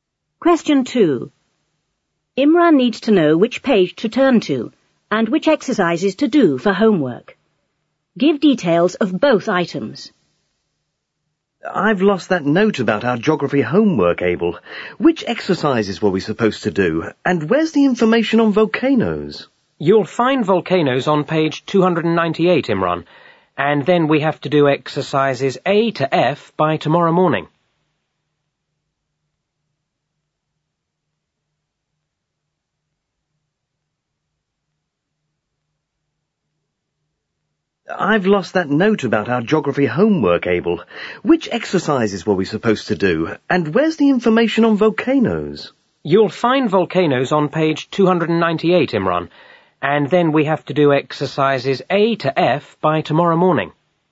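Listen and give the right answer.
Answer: Page 298; exercises A to F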